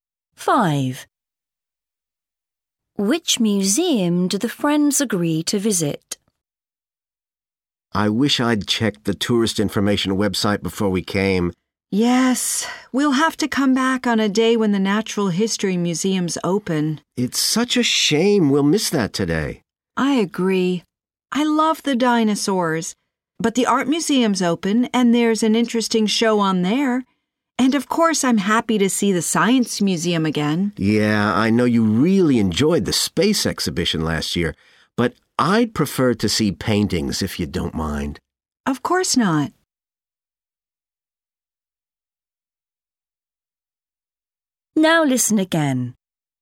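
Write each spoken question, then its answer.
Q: Which museum do the friends agree to visit?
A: the art museum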